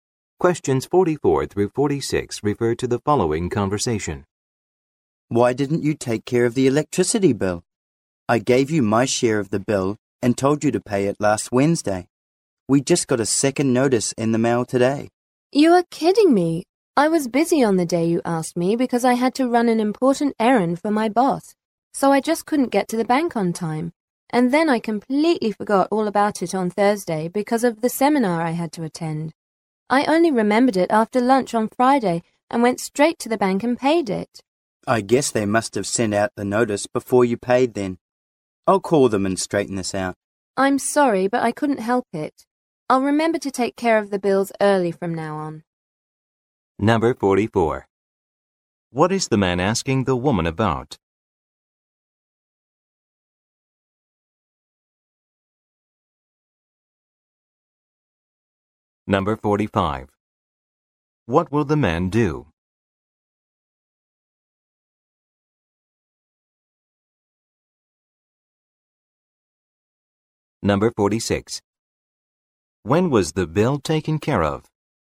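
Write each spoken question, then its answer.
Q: What is the man asking the woman about?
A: Why the electricity bill wasn't paid on time

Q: When was the bill taken care of?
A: Friday after lunch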